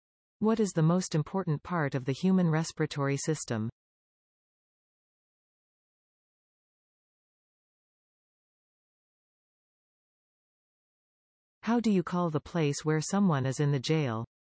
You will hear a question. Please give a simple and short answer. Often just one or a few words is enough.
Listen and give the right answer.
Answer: Lungs